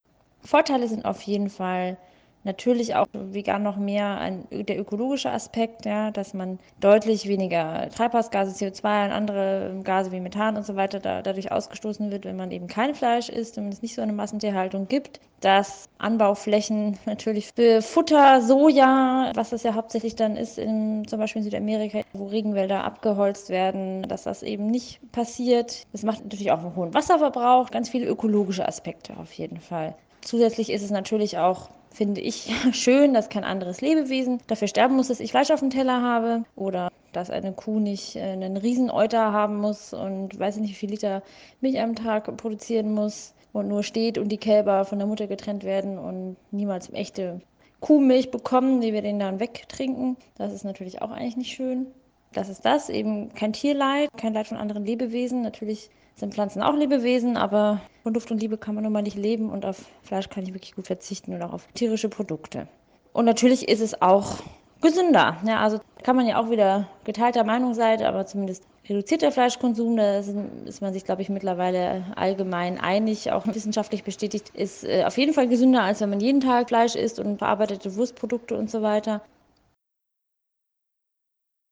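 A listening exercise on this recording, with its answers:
Gründe, warum sie sich vegetarisch oder vegan ernähren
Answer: Umweltschutz (weniger Treibhausgase, kein Abholzen, weniger Wasserverbrauch), kein Tierleid, gesünder.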